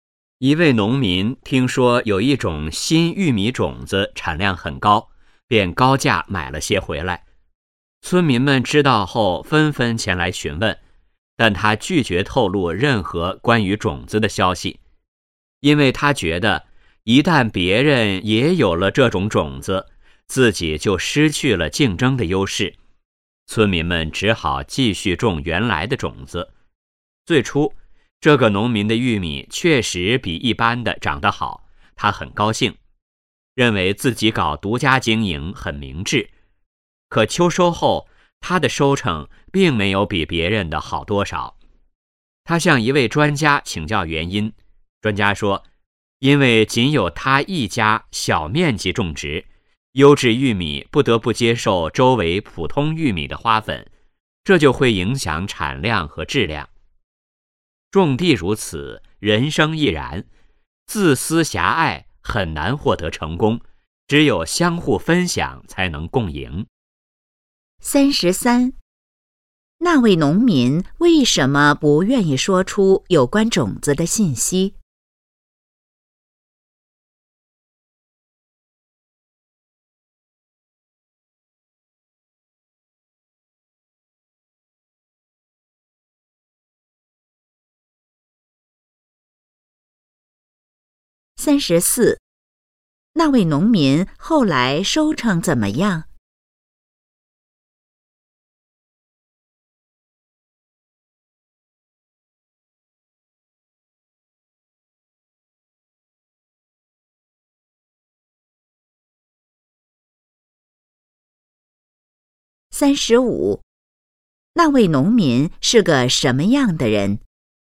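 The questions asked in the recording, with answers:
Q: 那位农民为什么不愿意说出有关种子的信息?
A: 怕失去竞争优势

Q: 那位农民后来收成怎么样?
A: 没比别人好多少

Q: 那位农民是个什么样的人?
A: 自私狭隘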